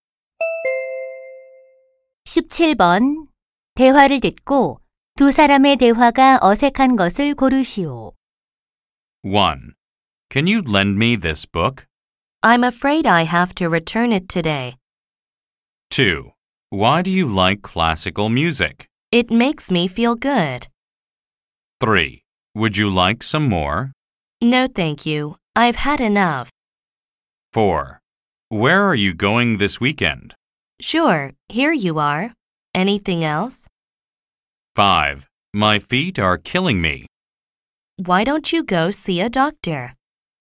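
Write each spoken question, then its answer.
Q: 대화를 듣고 두 사람의 대화가 어색한 것을 고르시오.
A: 4: Where are you going this weekend? / Sure, here you are. Anything else?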